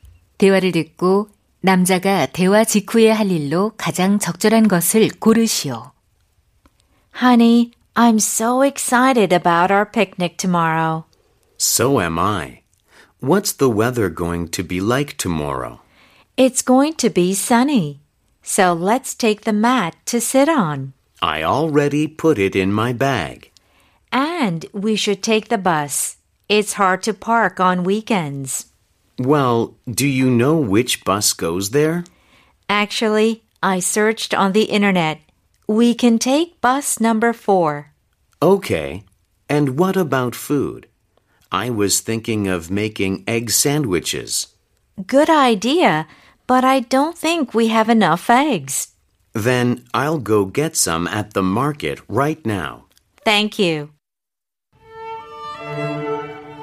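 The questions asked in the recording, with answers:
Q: 대화를 듣고 남자가 대화 직후에 할 일로 가장 적절한 것을 고르시오.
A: 시장에 가서 달걀 사기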